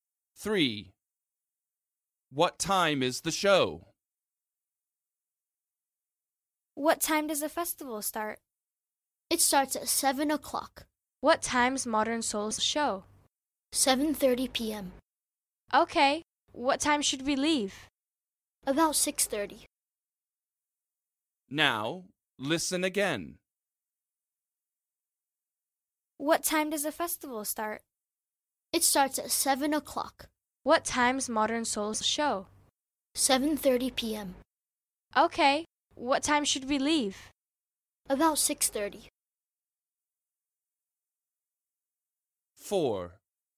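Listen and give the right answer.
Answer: 7:30 p.m.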